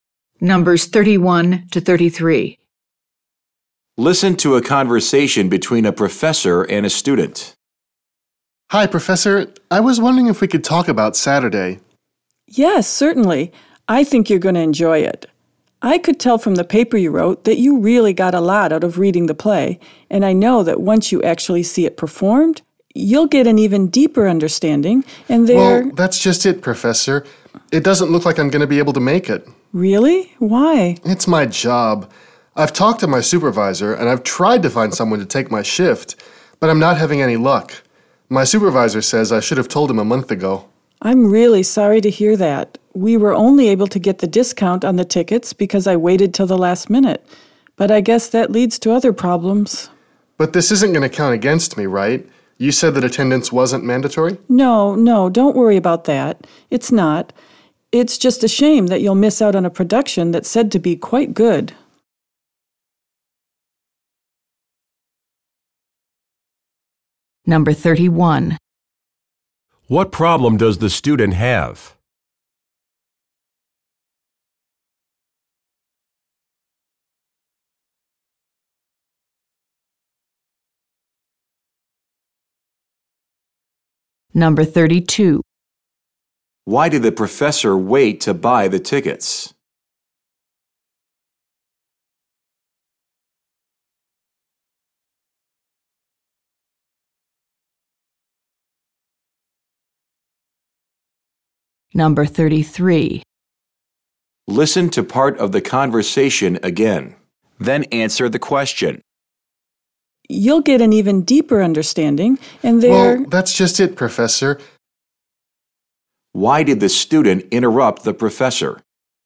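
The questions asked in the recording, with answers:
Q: What problem does the student have?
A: He can't attend the play on Saturday because he has to work.

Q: Why did the professor wait to buy the tickets?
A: To get discounted tickets at the last minute.

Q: Why did the student interrupt the professor?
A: To tell her he won't be able to go to the play.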